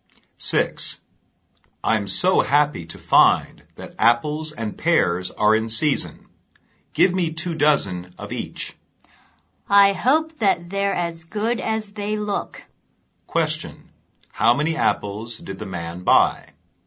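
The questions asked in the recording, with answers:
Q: How many apples did the man buy?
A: Two dozen (24)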